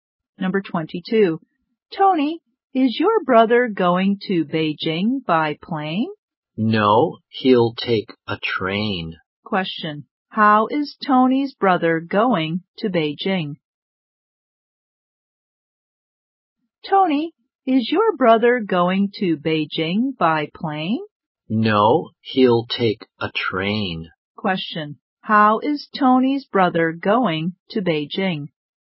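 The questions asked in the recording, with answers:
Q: How is Tony's brother going to Beijing?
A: By train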